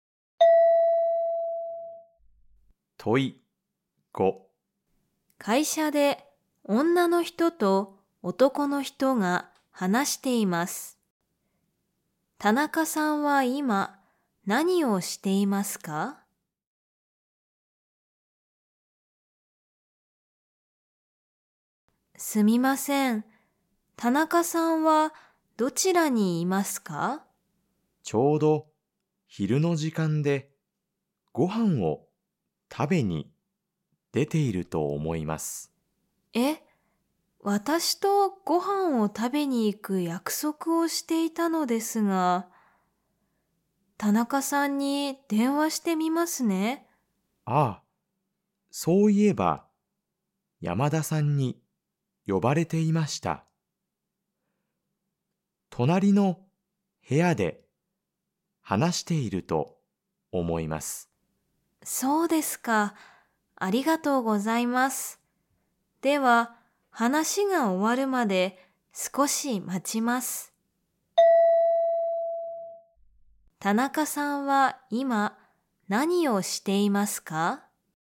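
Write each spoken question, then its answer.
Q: 田中さんは今何をしていますか?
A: 隣の部屋で山田さんと話している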